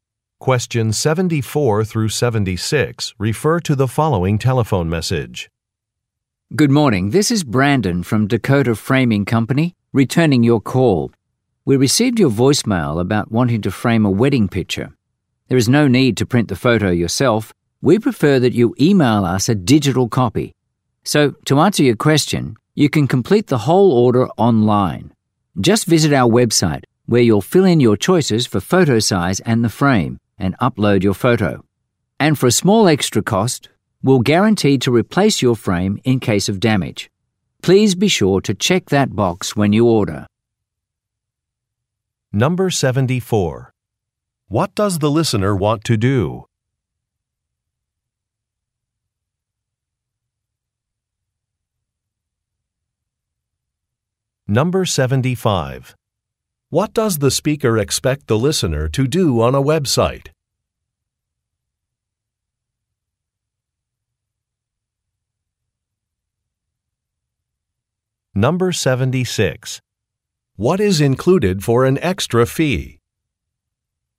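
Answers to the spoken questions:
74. Frame a wedding picture
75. Complete the order and upload the photo
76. Replacement of the frame in case of damage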